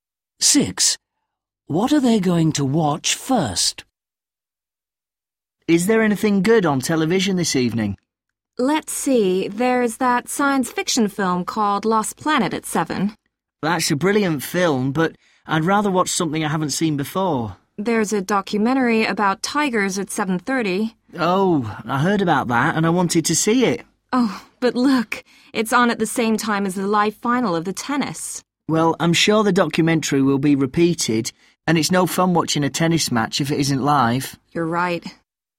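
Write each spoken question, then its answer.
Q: What are they going to watch first?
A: The live tennis final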